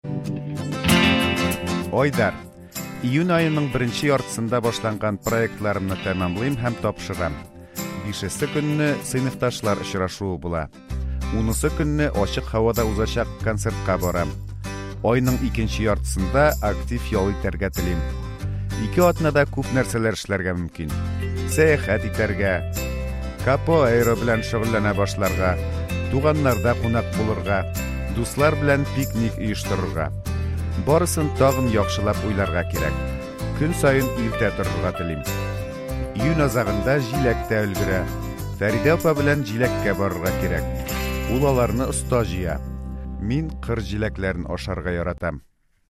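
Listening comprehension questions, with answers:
После прослушивания ответьте на вопросы:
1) Айдар проектларын кайчан тапшыра?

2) Унынчы июньдә нәрсә була?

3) Айдар ничә атна ял итә?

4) Егет туганнар белән очрашырга телиме?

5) Ул пикникка кем белән барырга тели?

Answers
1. Июнь айының беренче яртысында
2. Ачык һавада узачак концертка бара
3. Ике атна
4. Әйе, туганнарда кунак булырга тели
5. Дуслар белән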